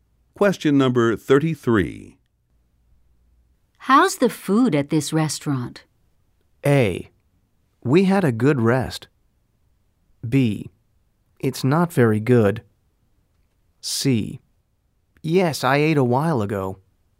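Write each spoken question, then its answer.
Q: How's the food at this restaurant?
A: B: It's not very good.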